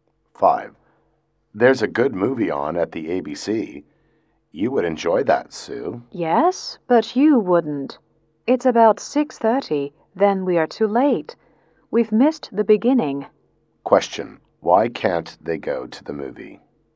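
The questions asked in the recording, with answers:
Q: Why can't they go to the movie?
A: They are too late and have missed the beginning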